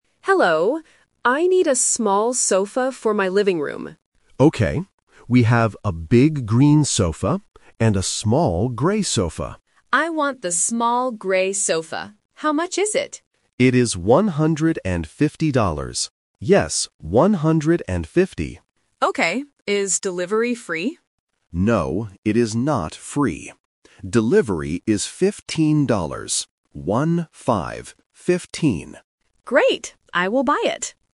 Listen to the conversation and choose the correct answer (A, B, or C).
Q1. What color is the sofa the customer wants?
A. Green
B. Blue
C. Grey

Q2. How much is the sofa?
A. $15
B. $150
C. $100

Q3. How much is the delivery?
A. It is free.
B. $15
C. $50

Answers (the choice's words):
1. Grey
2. $150
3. $15

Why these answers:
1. The customer says, "I want the small grey sofa". Option (A) is the trap because the assistant mentions a "green sofa", but it is big and the customer doesn't want it. Option (B) is a plausible color but is never mentioned.
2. The assistant repeats the price twice: "It is one hundred and fifty dollars." Option (A) is the trap because $15 is the price for delivery, not the sofa. Option (C) is a plausible price but is not mentioned.
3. The assistant says, "Delivery is fifteen dollars. One, five." Option (A) is the trap because the customer asks "Is delivery free?", but the assistant says "No". Option (C) is a sound-alike trap (fifty / fifteen) which is very common in A1 tests.

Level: A1